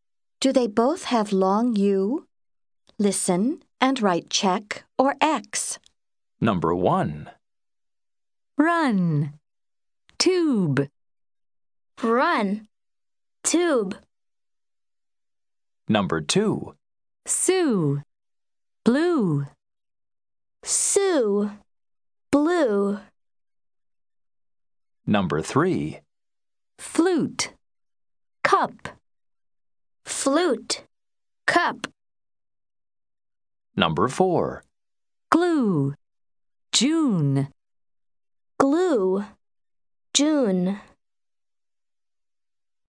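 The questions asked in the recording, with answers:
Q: Do they both have long U?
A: No (X): run has short u, tube has long u

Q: Do they both have long U?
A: Yes (check): Sue, blue

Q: Do they both have long U?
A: No (X): flute has long u, cup has short u

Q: Do they both have long U?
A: Yes (check): glue, June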